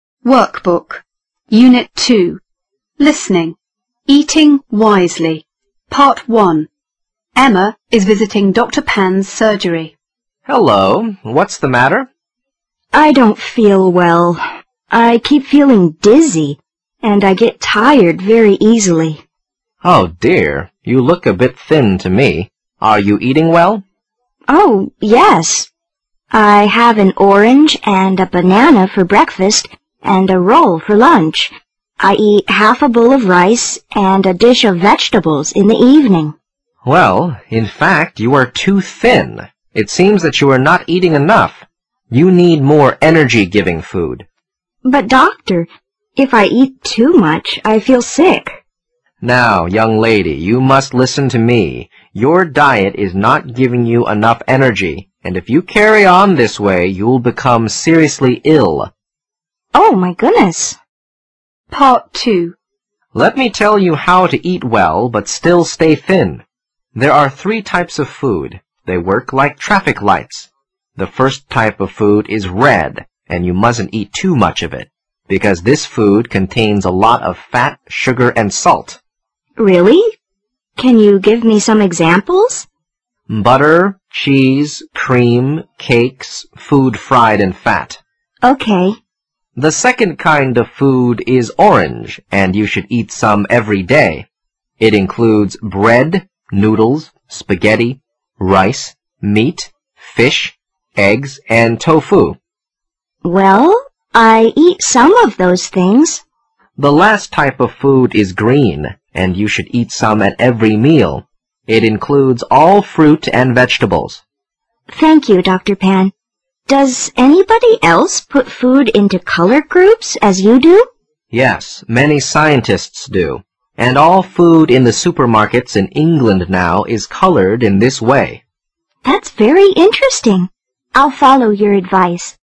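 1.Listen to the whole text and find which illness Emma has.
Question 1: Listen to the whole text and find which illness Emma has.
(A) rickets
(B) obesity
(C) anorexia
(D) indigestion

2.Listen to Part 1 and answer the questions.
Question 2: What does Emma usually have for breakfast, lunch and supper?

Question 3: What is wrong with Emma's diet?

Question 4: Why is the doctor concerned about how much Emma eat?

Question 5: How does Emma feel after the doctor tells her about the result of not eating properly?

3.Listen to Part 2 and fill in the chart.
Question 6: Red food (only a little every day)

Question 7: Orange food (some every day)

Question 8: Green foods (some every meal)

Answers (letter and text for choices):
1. (C) anorexia
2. An orange and a banana for breakfast, a roll for lunch, and half a bowl of rice and a dish of vegetables in the evening.
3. It does not give her enough energy; she is not eating enough.
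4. She is too thin, and if she carries on this way she will become seriously ill.
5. She is shocked and worried.
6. butter, cheese, cream, cakes, food fried in fat
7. bread, noodles, spaghetti, rice, meat, fish, eggs, tofu
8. all fruit and vegetables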